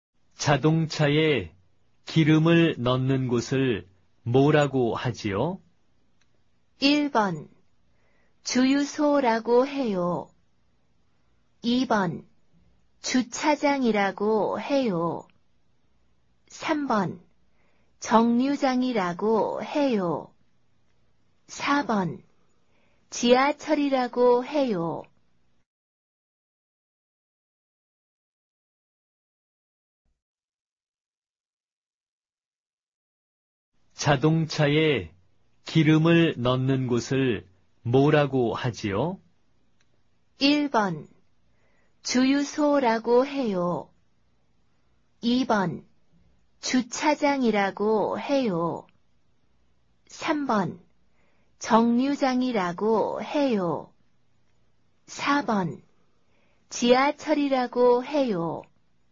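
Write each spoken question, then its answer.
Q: 자동차에 기름을 넣는 곳을 뭐라고 하지요?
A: 1: 주유소라고 해요.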